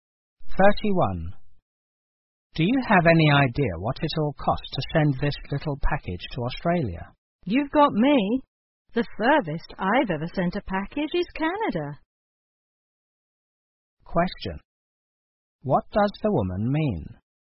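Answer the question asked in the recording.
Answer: She doesn't know the cost of sending a package to Australia.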